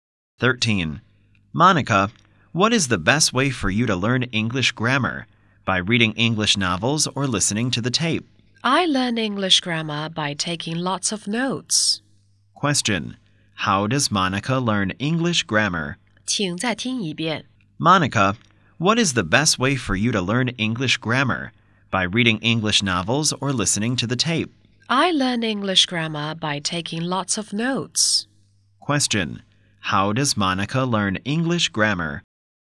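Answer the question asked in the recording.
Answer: By taking lots of notes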